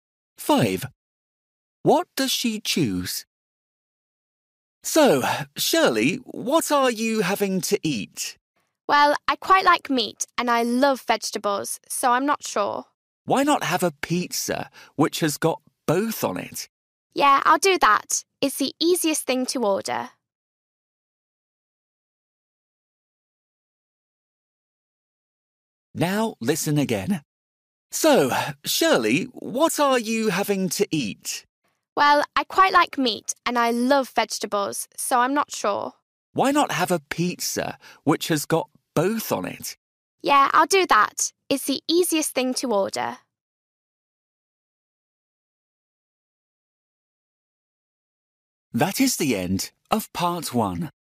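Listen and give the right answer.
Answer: A pizza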